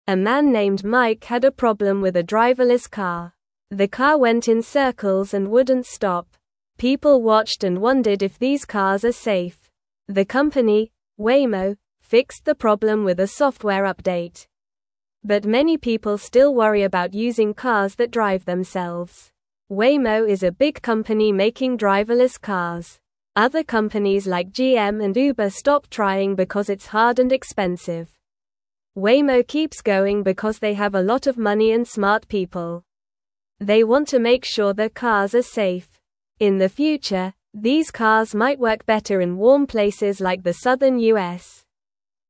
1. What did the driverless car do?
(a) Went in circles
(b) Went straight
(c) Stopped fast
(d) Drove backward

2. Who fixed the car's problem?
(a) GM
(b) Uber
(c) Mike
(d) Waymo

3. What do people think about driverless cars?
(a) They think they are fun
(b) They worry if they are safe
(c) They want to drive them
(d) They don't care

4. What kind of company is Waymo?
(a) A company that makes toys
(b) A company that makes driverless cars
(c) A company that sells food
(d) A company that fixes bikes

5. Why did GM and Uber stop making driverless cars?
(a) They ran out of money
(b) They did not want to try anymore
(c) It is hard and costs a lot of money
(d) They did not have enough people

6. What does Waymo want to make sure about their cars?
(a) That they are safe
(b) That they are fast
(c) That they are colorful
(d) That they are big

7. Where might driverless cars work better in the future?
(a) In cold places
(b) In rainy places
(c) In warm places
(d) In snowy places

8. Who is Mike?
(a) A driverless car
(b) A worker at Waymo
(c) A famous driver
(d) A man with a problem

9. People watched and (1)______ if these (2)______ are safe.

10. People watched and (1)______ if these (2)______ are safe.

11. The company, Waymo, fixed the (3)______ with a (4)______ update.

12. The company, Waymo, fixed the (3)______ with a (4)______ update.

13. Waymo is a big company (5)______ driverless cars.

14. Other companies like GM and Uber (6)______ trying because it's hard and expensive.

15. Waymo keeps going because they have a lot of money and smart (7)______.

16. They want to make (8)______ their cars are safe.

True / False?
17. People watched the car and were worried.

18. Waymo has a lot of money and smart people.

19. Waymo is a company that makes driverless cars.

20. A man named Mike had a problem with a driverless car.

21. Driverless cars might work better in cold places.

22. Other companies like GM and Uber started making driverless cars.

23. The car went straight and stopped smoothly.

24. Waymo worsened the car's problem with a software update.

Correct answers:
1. Went in circles
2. Waymo
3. They worry if they are safe
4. A company that makes driverless cars
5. It is hard and costs a lot of money
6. That they are safe
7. In warm places
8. A man with a problem
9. wondered
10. cars
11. problem
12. software
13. making
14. stopped
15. people
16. sure
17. True
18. True
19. True
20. True
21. False
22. False
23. False
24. False

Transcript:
The car went in circles and wouldn't stop. People watched and wondered if these cars are safe. The company, Waymo, fixed the problem with a software update. But many people still worry about using cars that drive themselves.
Waymo is a big company making driverless cars. Other companies like GM and Uber stopped trying because it's hard and expensive. Waymo keeps going because they have a lot of money and smart people. They want to make sure their cars are safe. In the future, these cars might work better in warm places like the southern U.S.

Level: Level 1

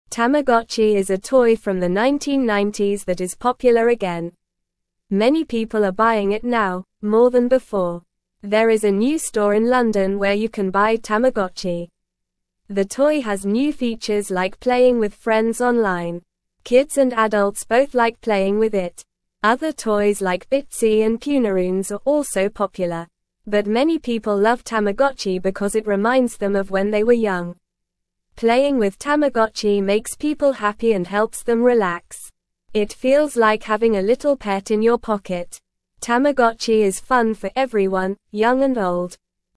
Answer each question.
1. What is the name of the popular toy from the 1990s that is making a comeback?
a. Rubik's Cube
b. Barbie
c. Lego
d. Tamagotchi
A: Tamagotchi

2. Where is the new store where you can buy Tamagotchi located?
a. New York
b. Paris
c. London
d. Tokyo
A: London

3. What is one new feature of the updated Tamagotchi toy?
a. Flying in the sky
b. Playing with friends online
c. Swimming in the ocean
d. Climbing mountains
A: Playing with friends online

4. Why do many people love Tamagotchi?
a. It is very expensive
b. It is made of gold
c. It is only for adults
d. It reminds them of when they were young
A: It reminds them of when they were young

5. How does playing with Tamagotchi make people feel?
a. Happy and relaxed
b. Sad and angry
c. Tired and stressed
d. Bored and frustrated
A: Happy and relaxed

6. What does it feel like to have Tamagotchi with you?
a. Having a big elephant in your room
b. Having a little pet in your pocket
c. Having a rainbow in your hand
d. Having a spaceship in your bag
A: Having a little pet in your pocket

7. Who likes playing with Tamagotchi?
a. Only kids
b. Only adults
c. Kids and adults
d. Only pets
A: Kids and adults

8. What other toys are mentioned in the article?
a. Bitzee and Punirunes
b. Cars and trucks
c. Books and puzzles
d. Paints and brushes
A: Bitzee and Punirunes

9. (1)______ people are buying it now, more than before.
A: Many

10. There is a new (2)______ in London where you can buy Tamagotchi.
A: store

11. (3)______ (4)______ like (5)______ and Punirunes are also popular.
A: Other

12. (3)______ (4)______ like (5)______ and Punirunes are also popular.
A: toys

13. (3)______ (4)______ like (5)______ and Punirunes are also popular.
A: Bitzee

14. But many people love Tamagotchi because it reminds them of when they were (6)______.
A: young

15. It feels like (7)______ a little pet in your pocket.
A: having

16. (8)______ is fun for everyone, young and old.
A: Tamagotchi

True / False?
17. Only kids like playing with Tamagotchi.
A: False

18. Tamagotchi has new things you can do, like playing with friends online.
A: True

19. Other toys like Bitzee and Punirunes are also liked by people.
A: True

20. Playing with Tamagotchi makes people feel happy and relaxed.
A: True

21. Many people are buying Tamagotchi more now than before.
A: True

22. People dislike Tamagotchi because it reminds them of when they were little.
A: False

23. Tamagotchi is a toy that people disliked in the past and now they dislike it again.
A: False

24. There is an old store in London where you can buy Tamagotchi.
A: False

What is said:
Tamagotchi is a toy from the 1990s that is popular again. Many people are buying it now, more than before. There is a new store in London where you can buy Tamagotchi. The toy has new features like playing with friends online. Kids and adults both like playing with it.
Other toys like Bitzee and Punirunes are also popular. But many people love Tamagotchi because it reminds them of when they were young. Playing with Tamagotchi makes people happy and helps them relax. It feels like having a little pet in your pocket. Tamagotchi is fun for everyone, young and old.

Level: Level 1

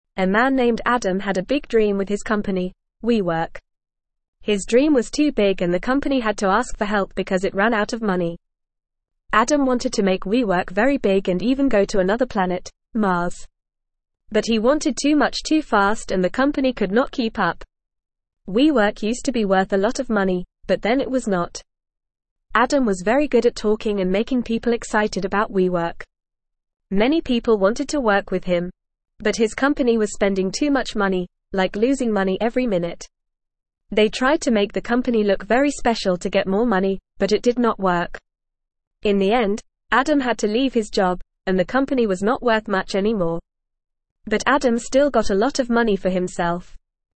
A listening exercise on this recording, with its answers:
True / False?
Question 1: Adam had no interest in expanding WeWork or going to Mars.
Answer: False

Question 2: WeWork was never worth a lot of money, so it remained the same.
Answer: False

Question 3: Adam was good at talking and making people excited about WeWork.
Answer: True

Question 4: Adam chose to stay in his job, and the company maintained its high value.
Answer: False

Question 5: WeWork ran out of money and had to ask for help.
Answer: True

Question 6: Adam did not earn a significant amount of money for himself.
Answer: False

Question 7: A man named Adam had a big dream for his company, WeWork.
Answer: True

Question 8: WeWork was spending too much money and losing money every minute.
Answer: True

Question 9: What is the name of the man in the article?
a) Adam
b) John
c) Michael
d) David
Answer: Adam

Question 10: What was the name of the company the man worked for?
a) WePlay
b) WeWork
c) WeLive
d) WeLove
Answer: WeWork

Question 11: What did the man want to do with his company?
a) Close it down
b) Keep it small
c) Sell it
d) Make it very big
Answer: Make it very big

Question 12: Where did the man want to go with his company?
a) Moon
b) Jupiter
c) Earth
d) Mars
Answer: Mars

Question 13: What was the problem with the company?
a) It was making too much money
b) It was too small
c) It was spending too much money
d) It was too slow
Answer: It was spending too much money

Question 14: What did the man have to do in the end?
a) Leave his job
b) Get a promotion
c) Start a new company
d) Buy a house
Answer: Leave his job

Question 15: What happened to the company's worth?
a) It became very valuable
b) It stayed the same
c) It was not worth much anymore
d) It went bankrupt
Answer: It was not worth much anymore

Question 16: What did the man still get a lot of?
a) Toys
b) Money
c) Candy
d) Books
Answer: Money

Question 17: A man (1)______ Adam had a big dream with his company, WeWork.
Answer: named

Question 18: His dream was too big and the company had to ask for help because it ran out of (2)______.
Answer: money

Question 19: But he (3)______ too much too fast and the company could not keep up.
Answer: wanted

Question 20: (4)______ used to be worth a lot of money, but then it was not.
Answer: WeWork

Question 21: But his company was spending too much money, like (5)______ money every (6)______.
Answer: losing

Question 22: But his company was spending too much money, like (5)______ money every (6)______.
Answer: minute

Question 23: They tried to make the company look very (7)______ to get more money, but it did not work.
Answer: special

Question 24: In the end, Adam had to leave his job, and the company was not (8)______ much anymore.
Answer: worth

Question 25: What was the name of the man who had a big dream?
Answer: The man's name was Adam.

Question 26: What was the name of the man's company?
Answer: The man's company was called WeWork.

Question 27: What did Adam want his company to do that was very big?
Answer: Adam wanted his company to be very big and even go to Mars.

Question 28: What happened to the company because it wanted too much too fast?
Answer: The company ran out of money because it wanted too much too fast.

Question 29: What did Adam's company do to try to get more money?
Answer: They tried to make the company look very special to get more money.

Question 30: What happened to Adam at the end of the story?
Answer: Adam had to leave his job at the end of the story.

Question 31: Did Adam get a lot of money or a little money for himself in the end?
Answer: Adam got a lot of money for himself in the end.

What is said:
A man named Adam had a big dream with his company, WeWork. His dream was too big and the company had to ask for help because it ran out of money. Adam wanted to make WeWork very big and even go to another planet, Mars. But he wanted too much too fast and the company could not keep up. WeWork used to be worth a lot of money, but then it was not.
Adam was very good at talking and making people excited about WeWork. Many people wanted to work with him. But his company was spending too much money, like losing money every minute. They tried to make the company look very special to get more money, but it did not work. In the end, Adam had to leave his job, and the company was not worth much anymore. But Adam still got a lot of money for himself.

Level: Level 1

